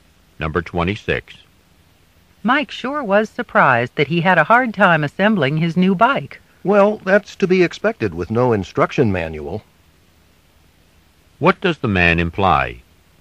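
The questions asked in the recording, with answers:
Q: What does the man imply?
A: Mike had trouble because the bike came without an instruction manual.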